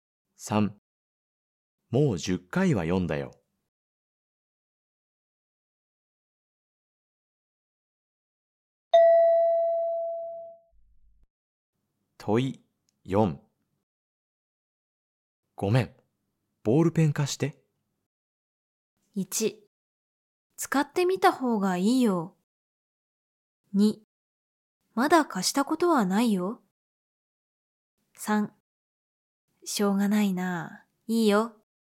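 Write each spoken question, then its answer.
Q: ごめん。ボールペン貸して。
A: 3: しょうがないな。いいよ。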